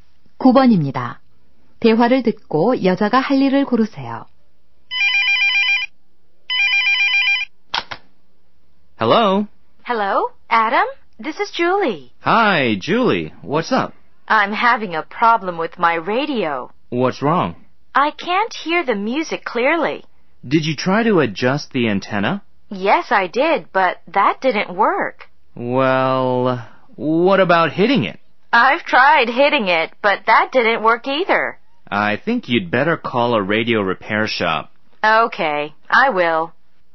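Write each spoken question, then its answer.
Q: 대화를 듣고 여자가 할 일을 고르세요.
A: 라디오 수리점에 전화하기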